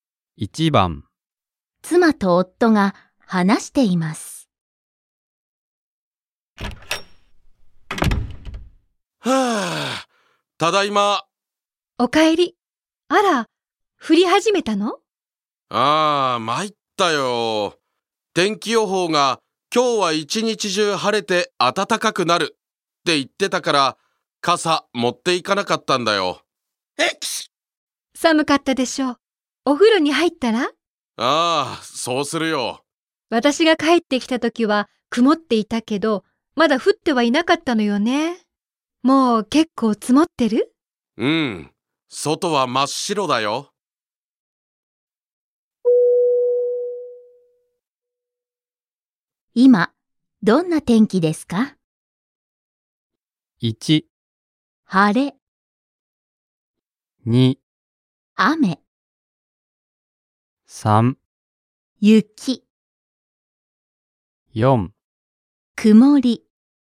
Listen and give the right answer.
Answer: Yes, the answer is 3番。